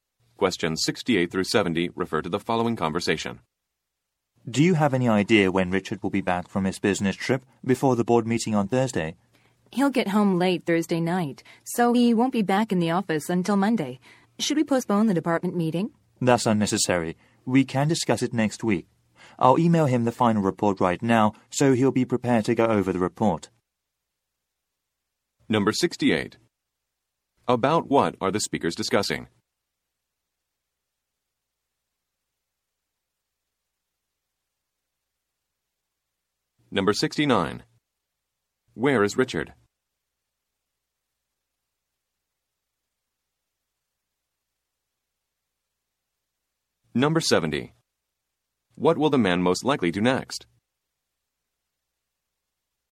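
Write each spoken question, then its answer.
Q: Where is Richard?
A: On a business trip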